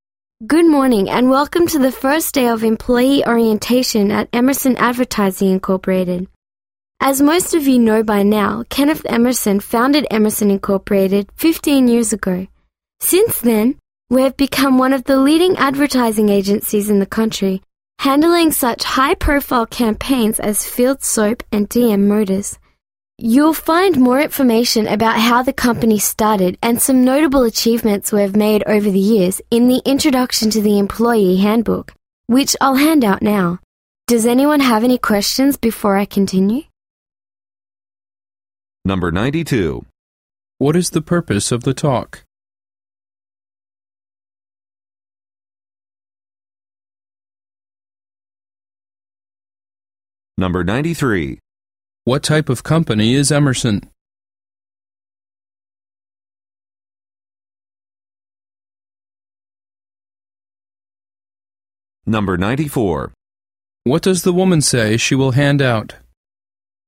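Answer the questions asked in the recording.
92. To welcome new employees to orientation
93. An advertising agency
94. The employee handbook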